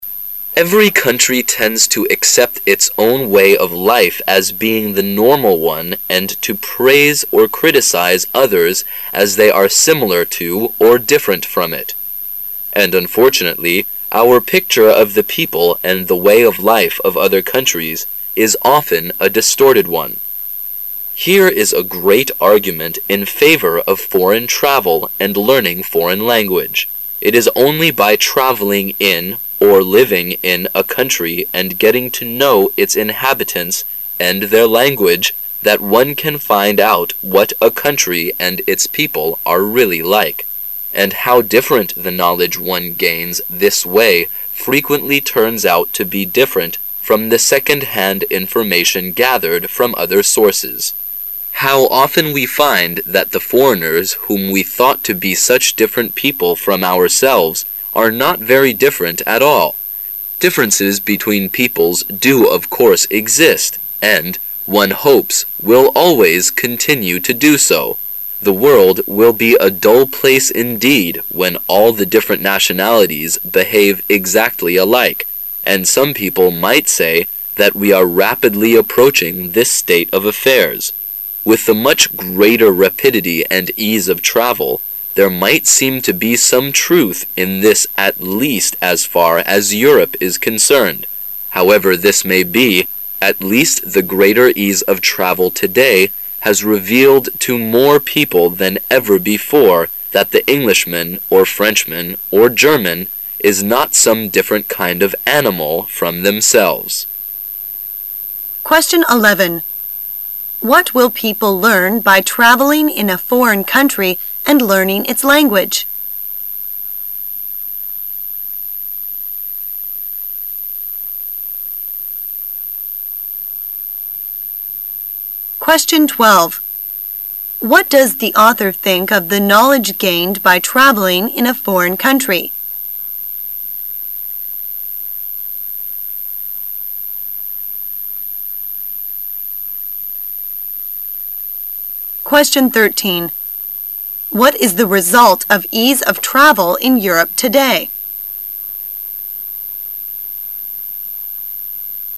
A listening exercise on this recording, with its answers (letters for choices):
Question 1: What does the author think of the knowledge gained by traveling in a foreign country?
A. It is from second-hand information.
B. It is from the arguments about the country.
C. It is different from what one had before the travel.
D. It is gathered from other sources than from its inhabitants.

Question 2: What is the result of ease of travel in Europe today?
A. Differences between people will gradually disappear.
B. Differences between people will not exist as one hopes.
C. Differences between people will always continue to exist and the world will be a dull place.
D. Differences between people do exist even though different nationalities behave exactly alike.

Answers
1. C
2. A

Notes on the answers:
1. 细节题。题干问本文作者对the knowledge gained by traveling in a foreign country的评价。回忆紧接.上题的细节,作者认为,通过到国外旅行获得的那些知识与通过别的渠道获得的二手信息相比,是很不一样的。正确回答题干问题的选项是[C]。[A]和[D]项内容是作者对没出国旅行前的原有知识的评价,[B]项内容没有依据。
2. 推理题。题干问今天ease of travel in Europe的结果是什么。原文中说"如果各个民族都变得alike了,这个世界会很无趣",随后说With the...ease of travel,至少在欧洲there might seem to be some truth in this。句中this指代前文中的各个民族都变得一样了的那种无趣的状态。正确回答题干的选项是[A]"人们之间的差别会逐渐消失"。

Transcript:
[解析] 11-13 Every country tends to accept its own way of life as being the normal one and to praise or criticize others as they are similar to or different from it. And unfortunately, our picture of the people and the way of life of other countries is often a distorted one. Here is a great argument in favor of foreign travel and learning foreign language. It is only by traveling in, or living in a country and getting to know its inhabitants and their language that one can find out what a country and its people are really like. And how different the knowledge one gains this way frequently turns out to be different from the second-hand information gathered from other sources! How often we find that the foreigners whom we thought to be such different people from ourselves are not very different at all! Differences between peoples do of course exist and, one hopes, will always continue to do so. The world will be a dull place indeed when all the different nationalities behave exactly alike, and some people might say that we are rapidly approaching this state of affairs. With the much greater rapidity and ease of travel, there might seem to be some truth in this at least as far as Europe is concerned. However this may be, at least the greater ease of travel today has revealed to more people than ever before that the Englishman or Frenchman or German is not some different kind of animal from themselves. 11.What will people learn by traveling in a foreign country and learning its language?